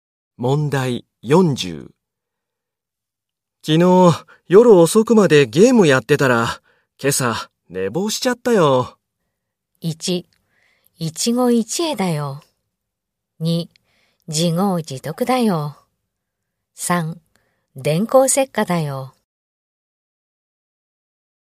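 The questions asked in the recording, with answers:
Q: 昨日夜遅くまでゲームやってたら、今朝寝坊しちゃったよ。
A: 2: 自業自得だよ。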